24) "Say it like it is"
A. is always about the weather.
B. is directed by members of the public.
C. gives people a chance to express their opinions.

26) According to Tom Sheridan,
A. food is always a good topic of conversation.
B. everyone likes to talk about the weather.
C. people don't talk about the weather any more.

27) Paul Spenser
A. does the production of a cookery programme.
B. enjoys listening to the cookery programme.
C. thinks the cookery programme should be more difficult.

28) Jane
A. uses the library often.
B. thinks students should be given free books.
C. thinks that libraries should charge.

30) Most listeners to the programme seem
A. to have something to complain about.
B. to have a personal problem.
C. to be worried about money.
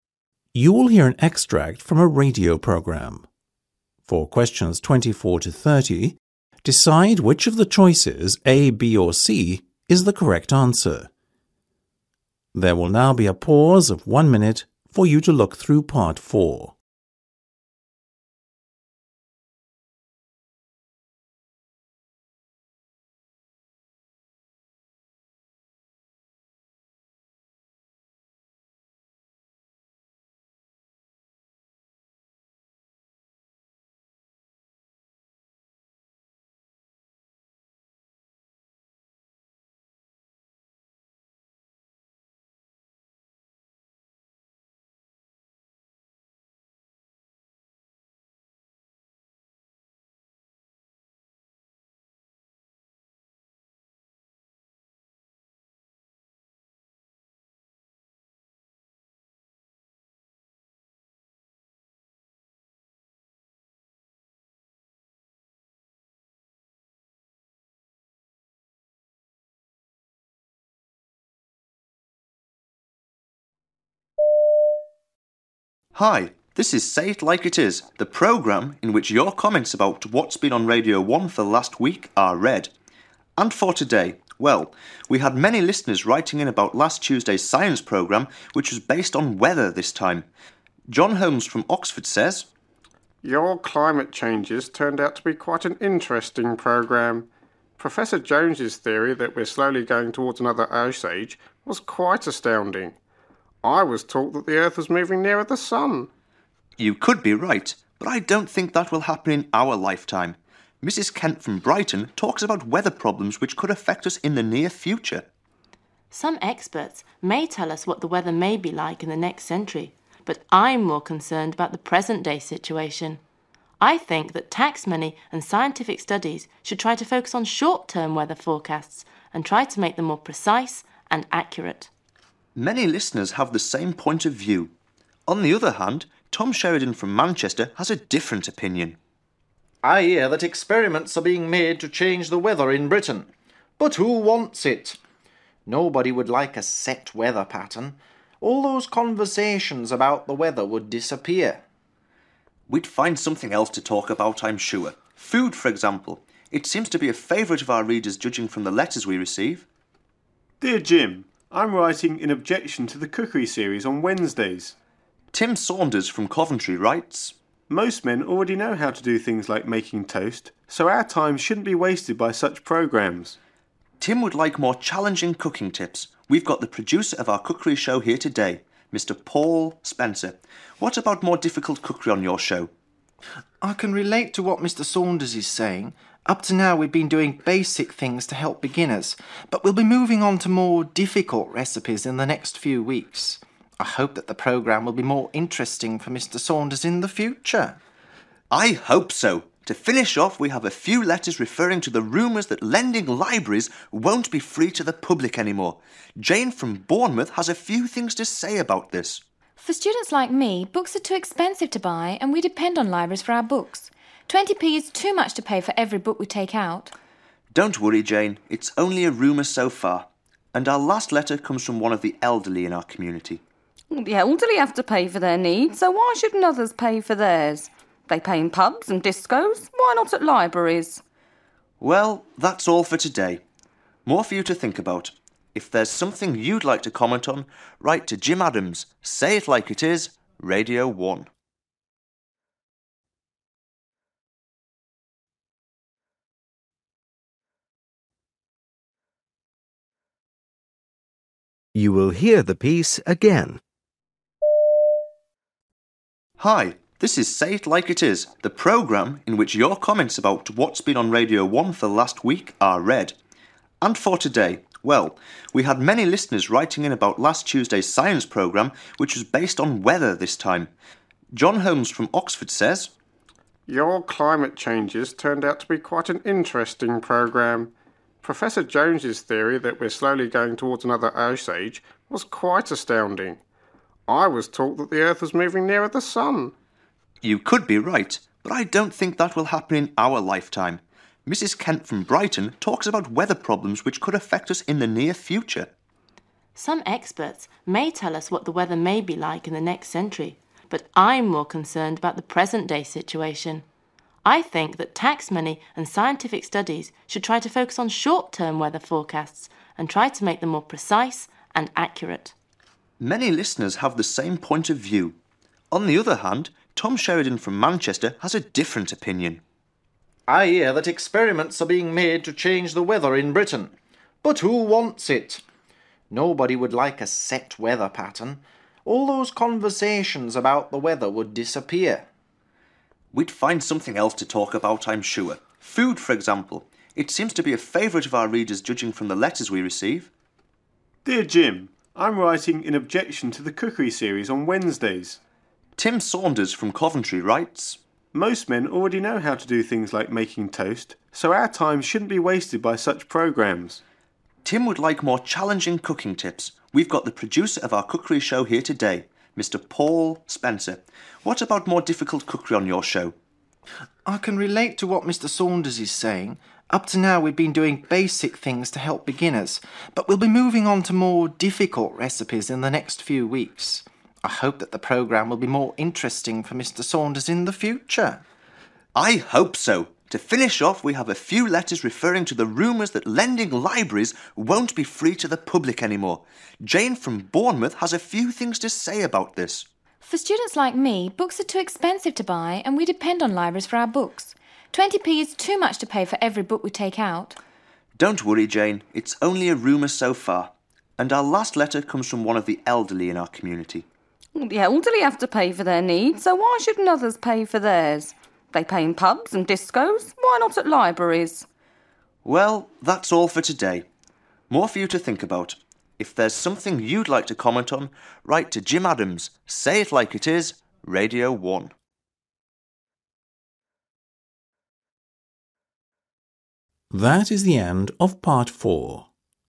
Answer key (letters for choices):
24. C
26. B
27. A
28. A
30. A

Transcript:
JA: Hi, this is "Say it like it is", the programme in which your comments about what's been on Radio One for the last week are read. And for today ... Well, we had many listeners writing in about last Tuesday's science programme which is based on weather this time. John Holmes from Oxford says:
R: Your "Climate changes" turned out to be quite an interesting programme. Professor Jones' theory that we're slowly going towards another Ice Age was quite astounding. I was taught that the earth was moving nearer the sun!
JA: You could be right. But I don't think that it will happen in our lifetime. Mrs Kent from Brighton talks about weather problems which could affect us in the near future.
R: Some experts may tell us what the weather may be like in the next century but I'm more concerned about the present day situation. I think that tax money and scientific studies should try to focus on short-term weather forecasts and try to make them more precise and accurate.
JA: Many listeners have the same point of view. On the other hand, Tom Sheridan from Manchester has a different opinion.
R: I hear that experiments are being made to change the weather in Britain. But, who wants it? Nobody would like a set weather pattern. All those conversations about the weather would disappear.
JA: We'd find something else to talk about. I'm sure. Food, for example. It seems to be a favourite of our readers judging from the letters we receive ...
R: Dear Jim, I'm writing in objection to the Cookery Series on Wednes days.
JA: Tim Saunders, from Coventry writes;
R: Most men already know how to do things like making toast so our time shouldn't be wasted by such programmes.
JA: Tim would like more challenging cooking tips. We've got the producer of our cookery show here today, Mr. What about more difficult cookery on your show?
PS: I can relate to what Mr. Saunders is saying. Up to now we've been doing basic things to help beginners but we'll be moving on to more difficult recipes in the next few weeks. I hope that the programme will be more interesting for Mr. Saunders in the future.
JA: I hope so! To finish off we have a few letters referring to the rumours that lending libraries won't be free to the public anymore. Jane from Bournemouth has a few things to say about this.
R: For students like me, books are too expensive to buy and we depend on libraries for our books! 20p is too much to pay for every book we take out.
JA: Don't worry Jane. It's only a rumour so far. And our last letter comes from one of the elderly in our community.
R: The elderly have to pay for their needs so why shouldn't others pay for theirs? They pay in pubs and discos, why not at libraries.
JA: Well, that's all for today. More for you to think about. If there's something you'd like to comment on write to Jim Adams, "Say It Like It Is" Radio One.

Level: FCE (B2)